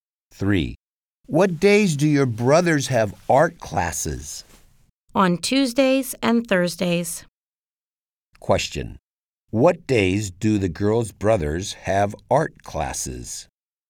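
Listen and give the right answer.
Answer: On Tuesdays and Thursdays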